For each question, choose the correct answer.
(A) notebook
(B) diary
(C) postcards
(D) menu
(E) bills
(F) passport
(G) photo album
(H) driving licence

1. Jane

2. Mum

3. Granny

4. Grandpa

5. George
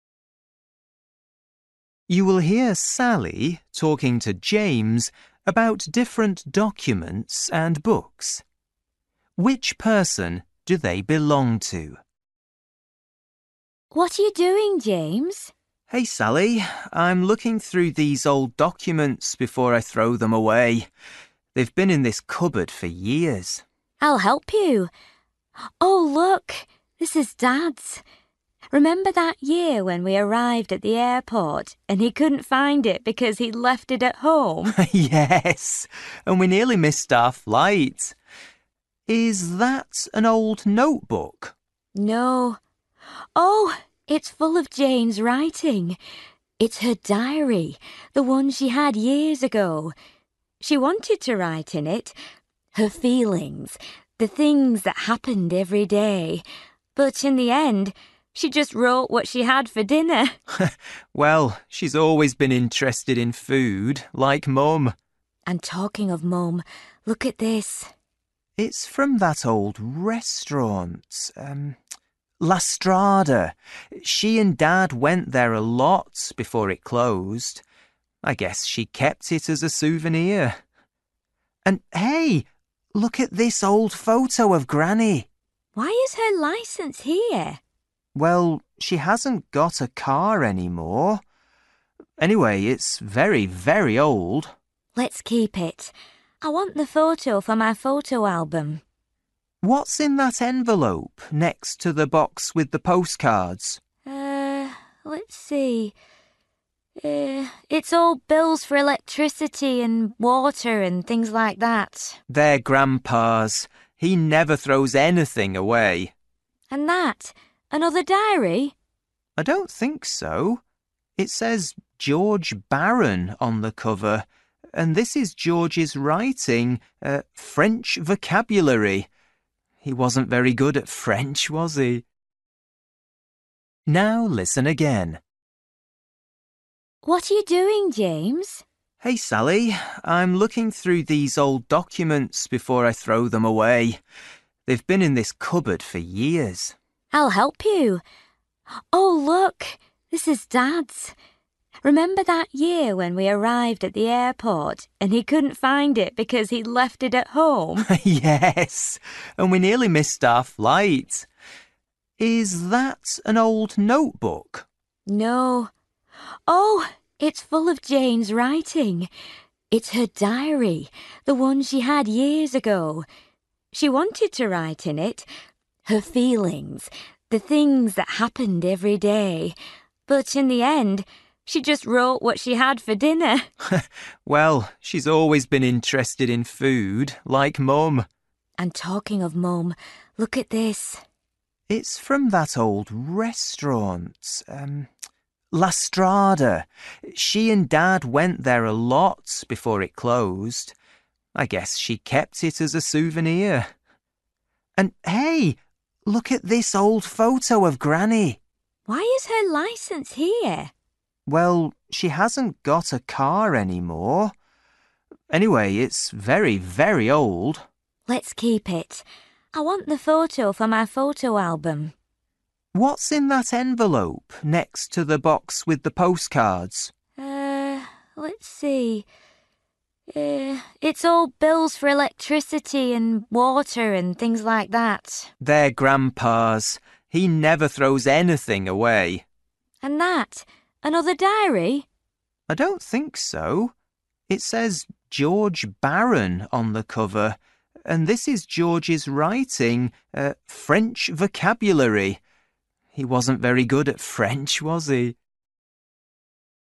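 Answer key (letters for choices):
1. B
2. D
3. H
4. E
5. A

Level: Luyện nghe trình độ A2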